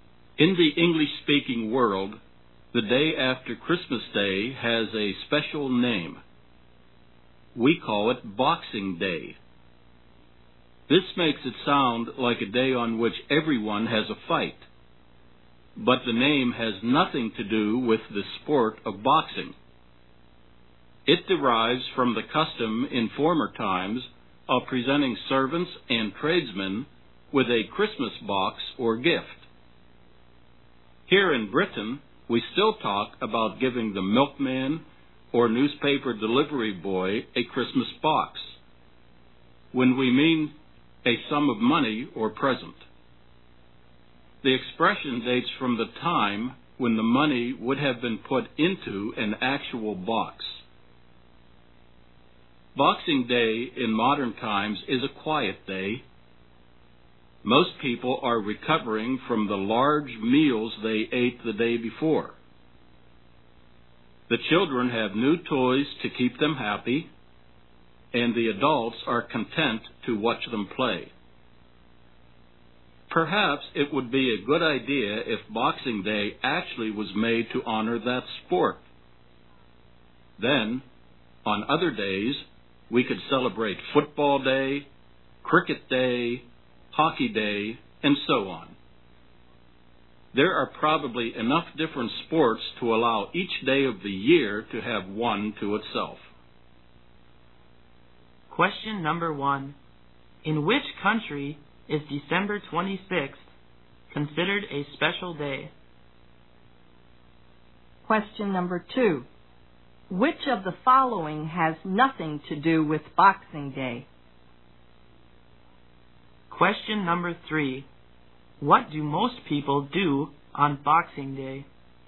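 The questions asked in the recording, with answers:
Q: In which country is December 26th considered a special day?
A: In English-speaking countries, such as Britain

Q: What do most people do on Boxing Day?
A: They have a quiet day recovering from the large meals of Christmas Day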